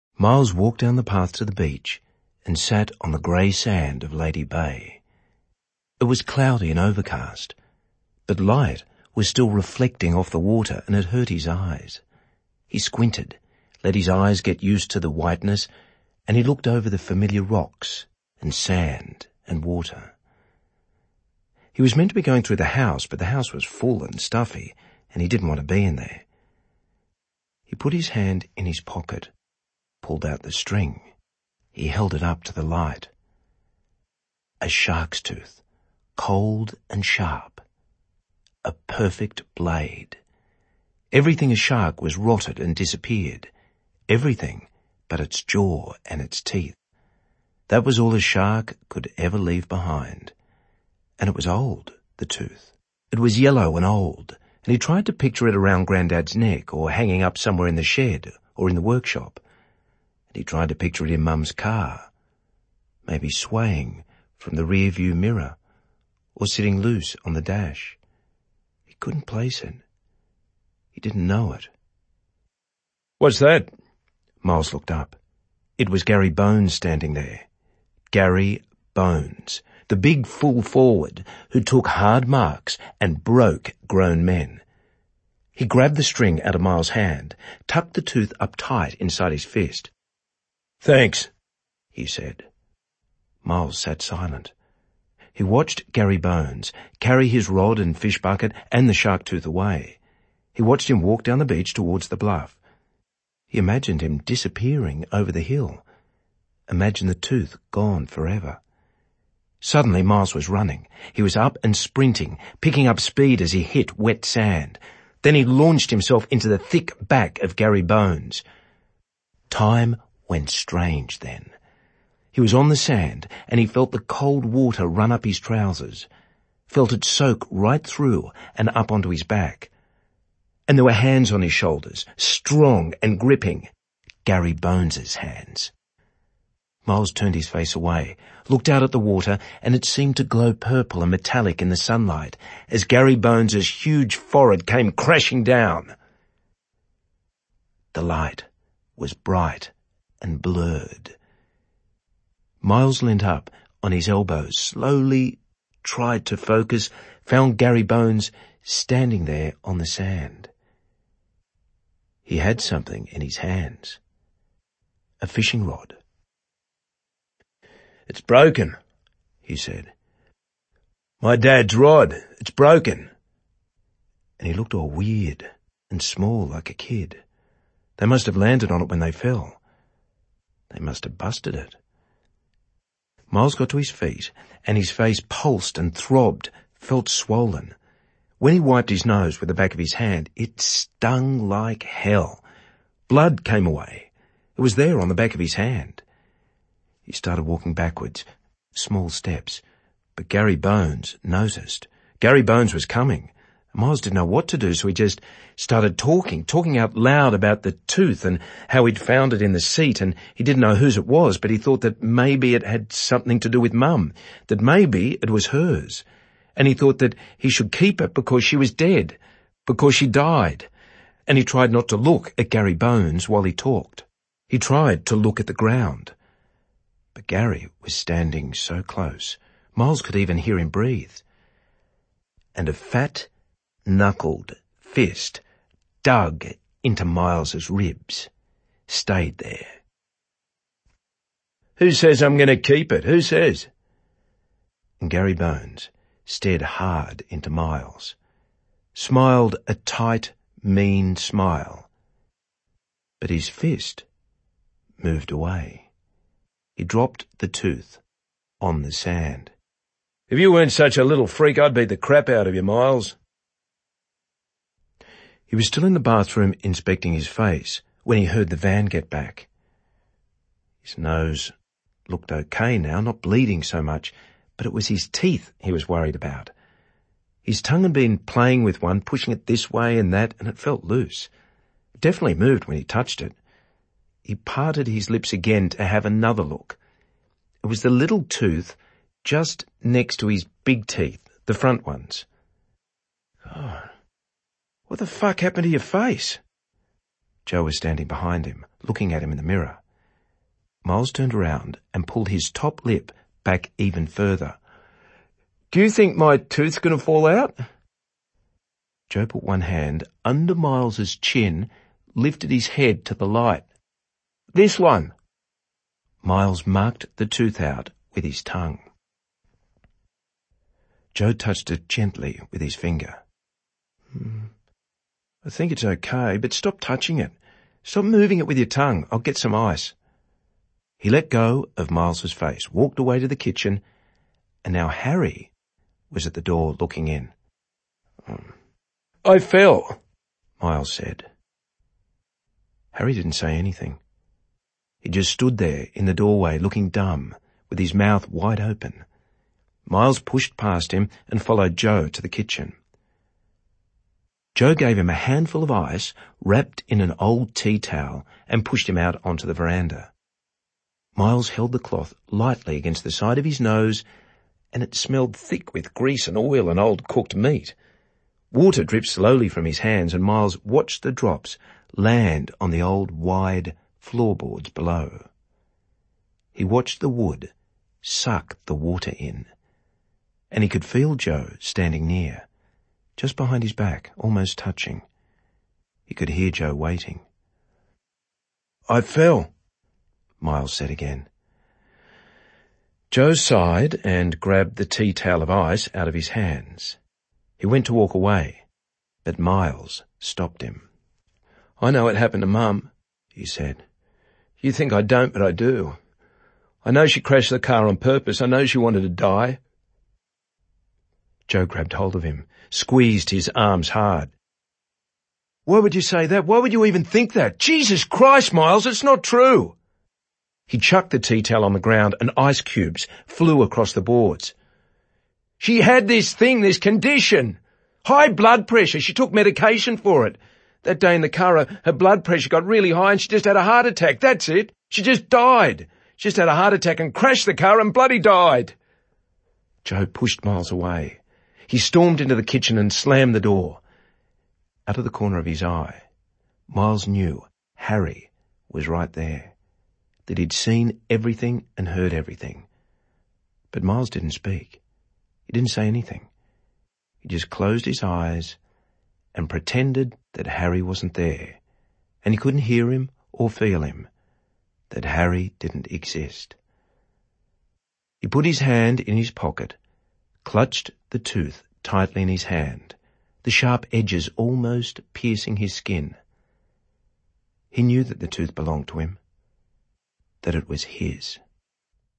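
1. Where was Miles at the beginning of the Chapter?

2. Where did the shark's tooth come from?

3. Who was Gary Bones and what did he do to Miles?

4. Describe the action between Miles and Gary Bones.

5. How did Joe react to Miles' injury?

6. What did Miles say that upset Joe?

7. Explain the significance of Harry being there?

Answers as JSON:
{"1": "Sitting on the grey sand of the beach at Lady Bay.", "2": "He found it in the seat (of Mum's car); it may have been Mum's.", "3": "A big full forward (footballer) who grabbed the shark's tooth from Miles and headbutted him.", "4": "Miles ran and jumped onto Gary's back, they fell into the water, Gary headbutted him and the fishing rod broke; Gary dug a fist into his ribs, then dropped the tooth.", "5": "He asked what happened, checked the loose tooth gently, told him to stop touching it and got him ice.", "6": "That Mum crashed the car on purpose because she wanted to die.", "7": "Harry saw and heard everything, including what Miles said about Mum."}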